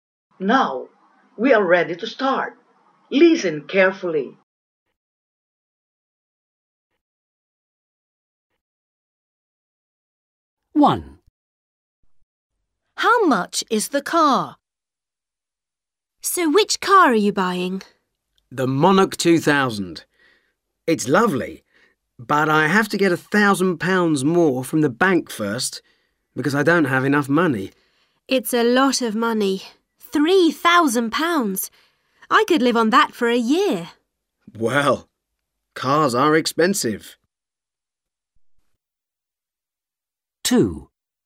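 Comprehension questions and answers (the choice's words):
How much is the car?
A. £1000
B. £2000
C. £3000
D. £4000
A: £3000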